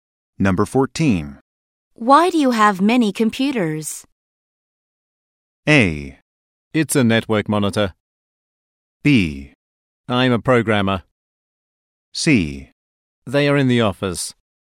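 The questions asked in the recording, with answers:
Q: Why do you have many computers?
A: B: I'm a programmer.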